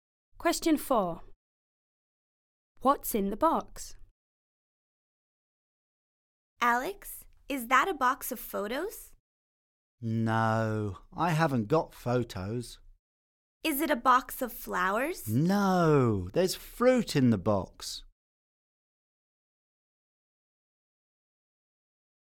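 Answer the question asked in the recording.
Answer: fruit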